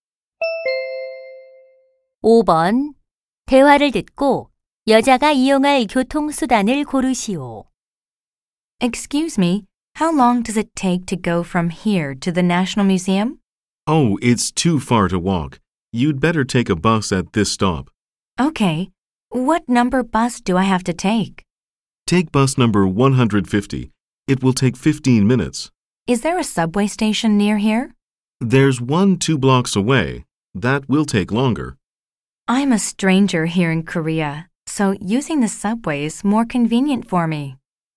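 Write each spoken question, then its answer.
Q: 대화를 듣고 여자가 이용할 교통수단을 고르시오.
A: 지하철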